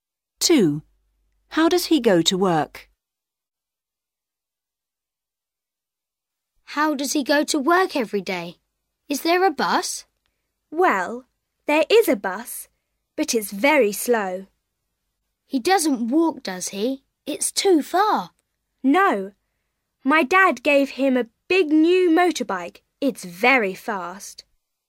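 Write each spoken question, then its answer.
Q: How does he go to work?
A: By motorbike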